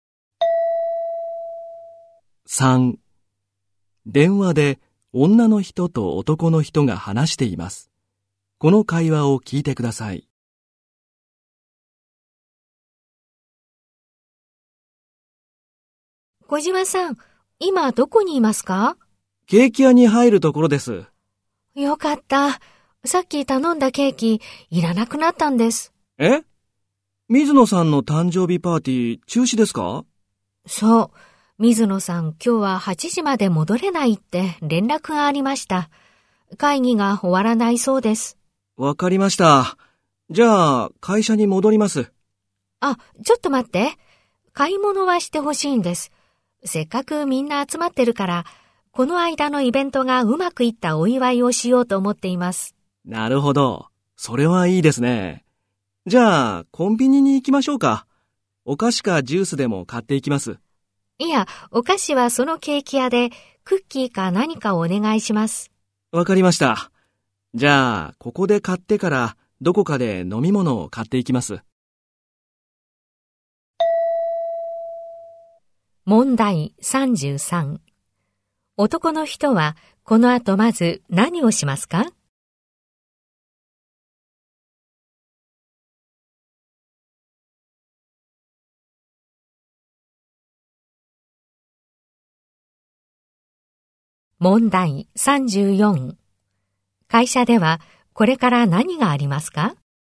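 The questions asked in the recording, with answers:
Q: 男の人は、この後まず何をしますか?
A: ケーキ屋でクッキーなどのお菓子を買う

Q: 会社ではこれから何がありますか?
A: この間のイベントがうまくいったお祝い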